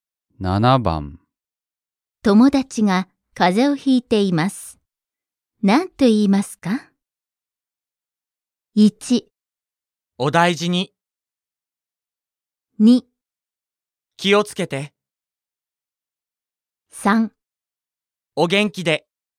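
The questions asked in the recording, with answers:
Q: 友達が風邪をひいています。何と言いますか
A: 1: お大事に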